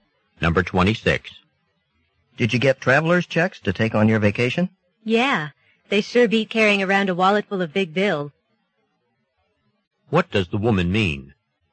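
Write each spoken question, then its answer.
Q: What does the woman mean?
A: Traveler's checks are better than carrying lots of cash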